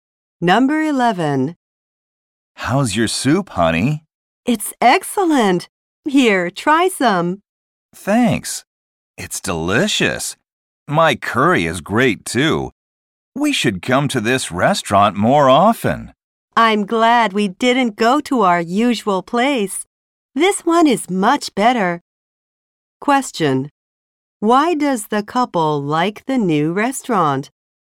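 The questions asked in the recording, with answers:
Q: Why does the couple like the new restaurant?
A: The food is better than at their usual place.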